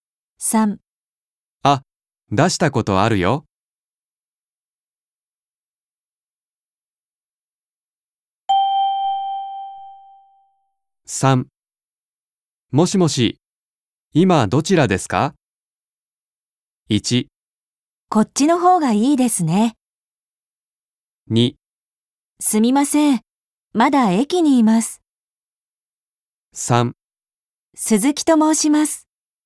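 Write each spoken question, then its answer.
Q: もしもし、今どちらですか?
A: 2: すみません、まだ駅にいます。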